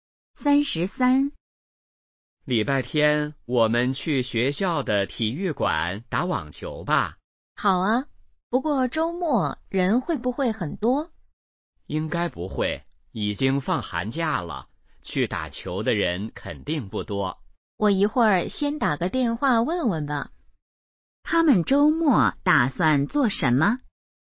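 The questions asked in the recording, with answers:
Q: 他们周末打算做什么?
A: 打网球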